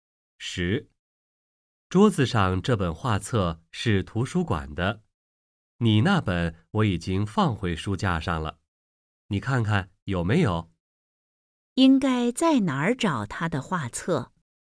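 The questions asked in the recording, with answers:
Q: 应该在哪儿找他的画册?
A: 书架上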